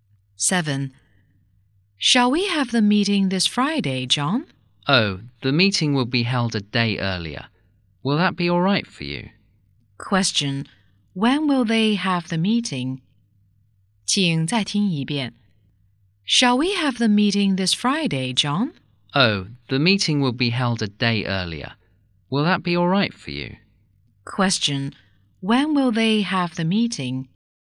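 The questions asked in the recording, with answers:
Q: Question. When will they have the meeting?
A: This Thursday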